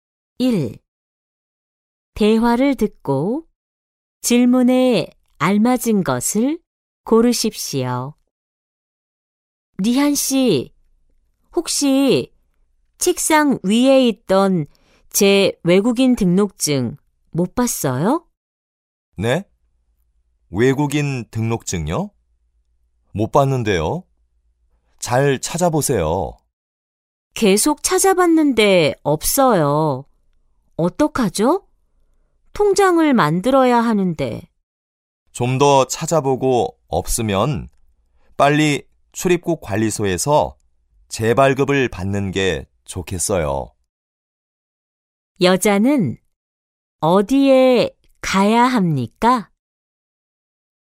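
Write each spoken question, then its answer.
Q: 여자는 어디에 가야 합니까?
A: 출입국 관리소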